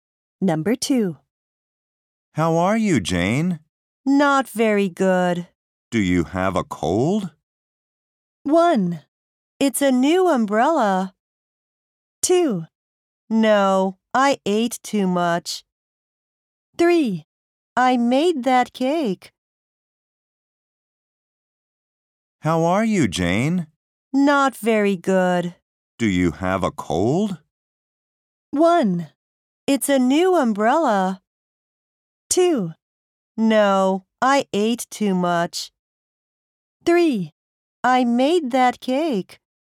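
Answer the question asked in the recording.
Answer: 2: No, I ate too much.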